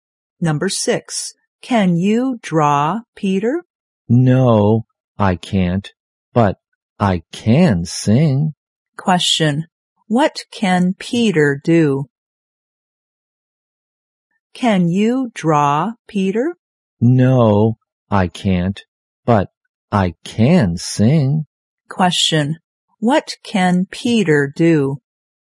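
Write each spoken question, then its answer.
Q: what can Peter do?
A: Sing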